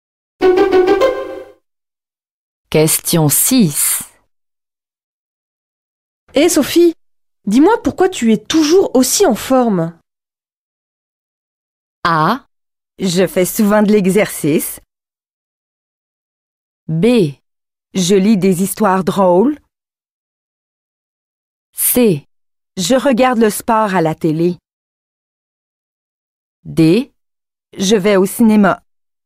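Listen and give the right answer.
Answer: A: Je fais souvent de l'exercice.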